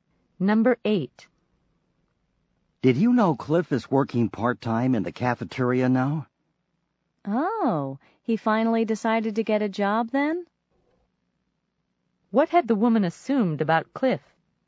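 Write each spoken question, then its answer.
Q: What had the woman assumed about Cliff?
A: That he wasn't going to get a job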